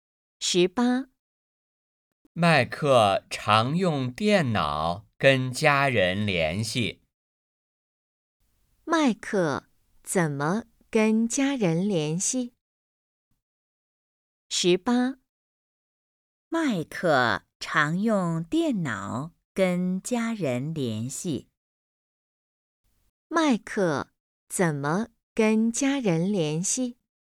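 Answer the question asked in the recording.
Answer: 用电脑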